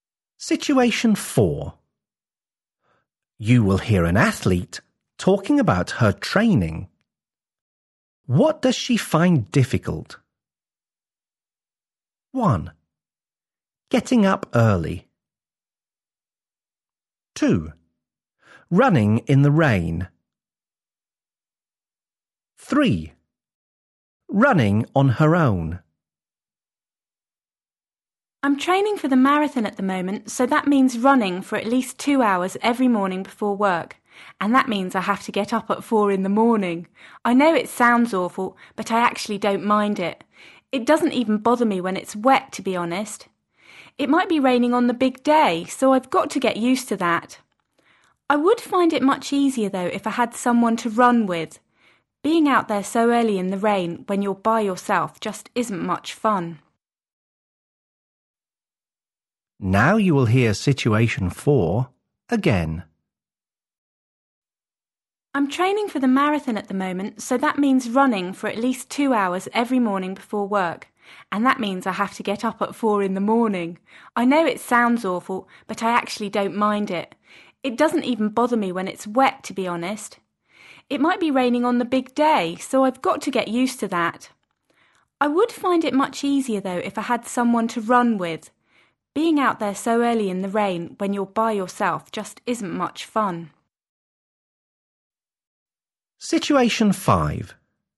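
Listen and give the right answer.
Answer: 3: Running on her own.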